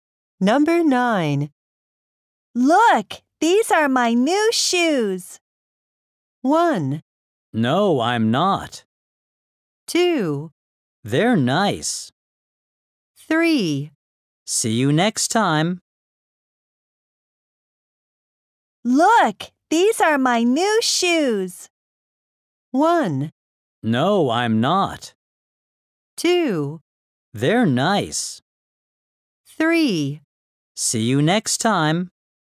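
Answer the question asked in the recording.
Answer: 2: They're nice.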